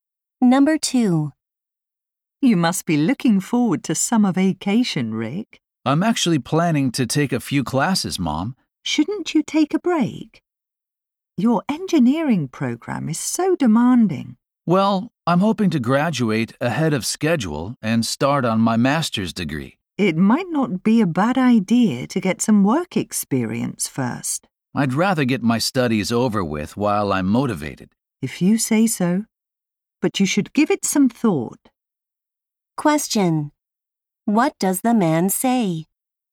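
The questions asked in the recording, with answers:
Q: What does the man say?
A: He wants to take classes in summer to graduate early and start his master's degree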